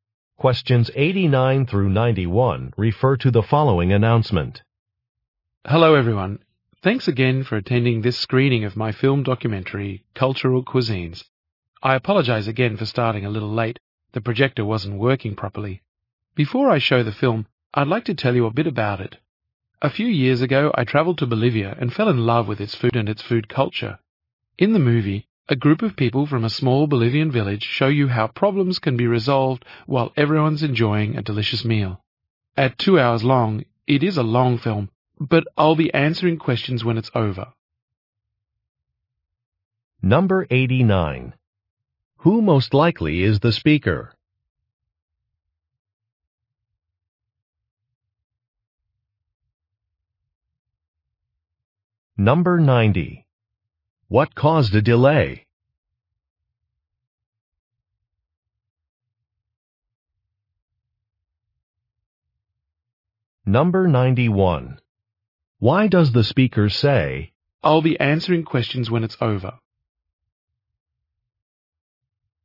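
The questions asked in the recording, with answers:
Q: Who most likely is the speaker?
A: A filmmaker

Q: What caused a delay?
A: The projector was not working properly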